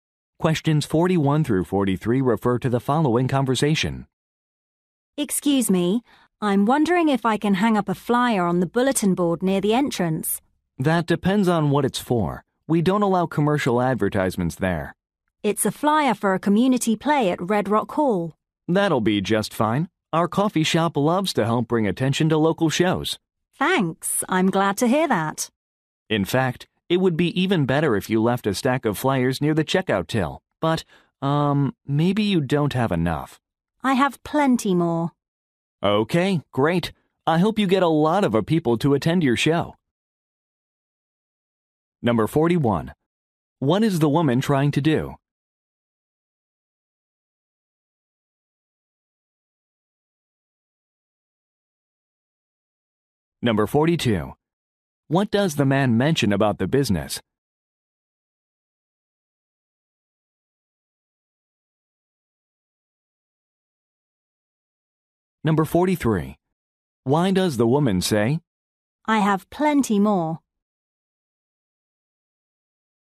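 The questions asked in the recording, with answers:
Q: What is the woman trying to do?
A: Put up a flyer for a community play

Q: What does the man mention about the business?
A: It likes to help promote local shows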